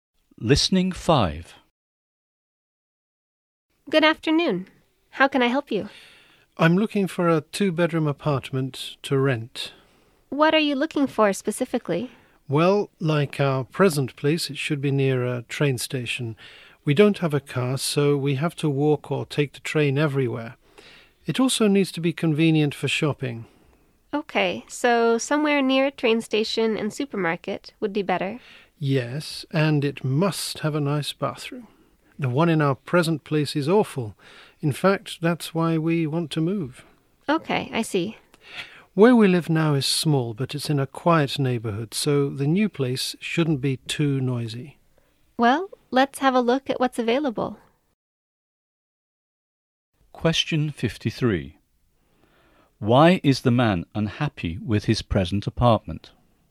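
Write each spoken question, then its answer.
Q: Why is the man unhappy with his present apartment?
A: The bathroom is awful.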